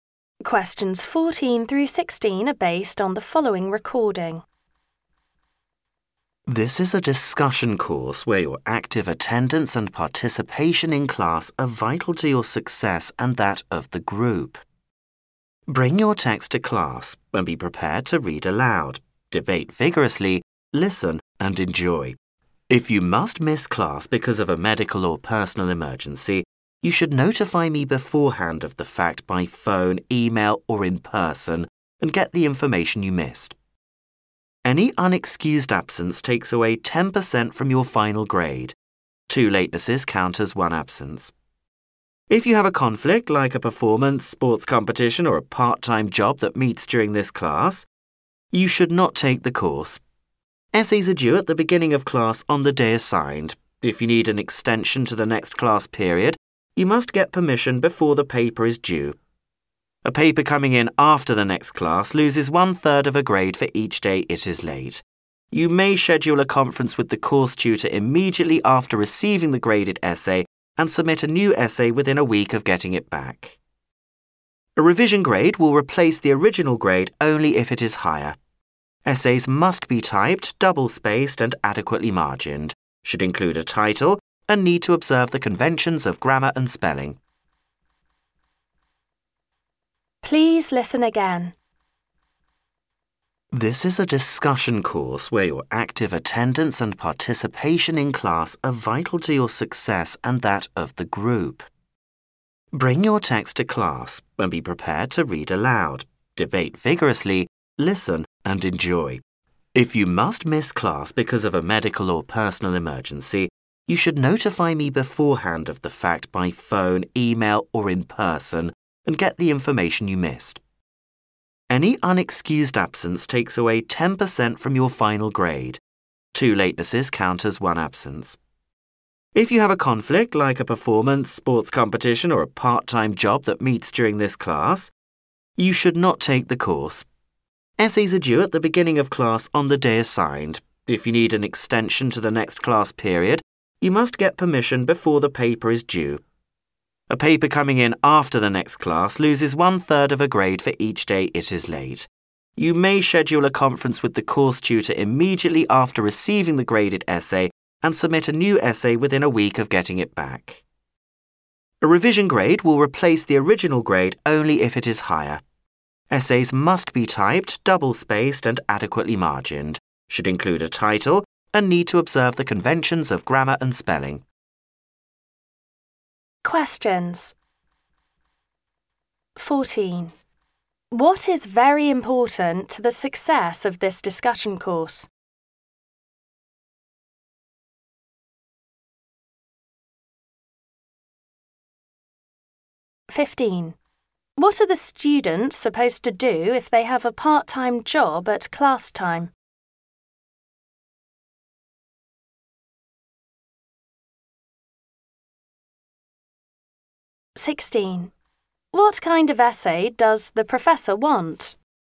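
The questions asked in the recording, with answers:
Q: What is very important to the success of this discussion course?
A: Active attendance and participation in class

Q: What are the students supposed to do if they have a part-time job at class time?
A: Not take the course

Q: What kind of essay does the professor want?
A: Typed, double-spaced, with a title and correct grammar and spelling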